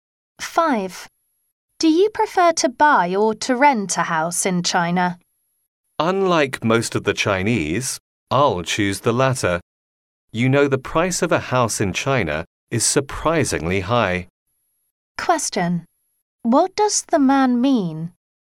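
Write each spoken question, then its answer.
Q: What does the man mean?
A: He prefers to rent a house because house prices in China are very high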